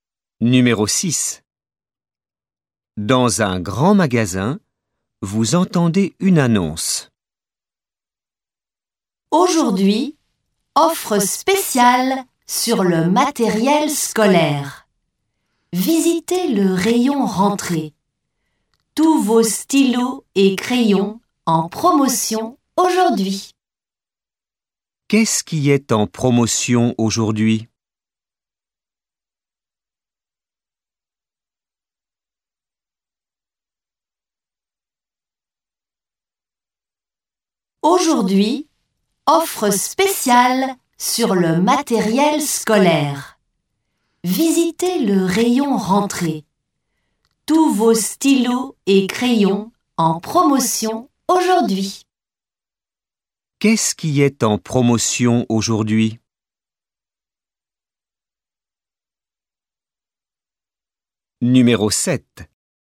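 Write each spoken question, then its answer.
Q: Qu'est-ce qui est en promotion aujourd'hui?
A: Les stylos et crayons (matériel scolaire)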